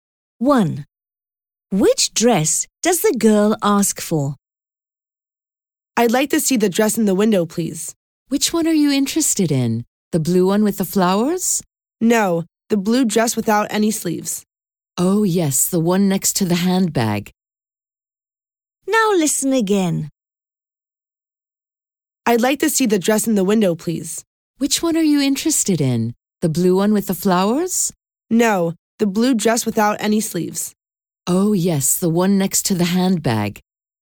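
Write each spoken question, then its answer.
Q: Which dress does the girl ask for?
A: The blue dress without any sleeves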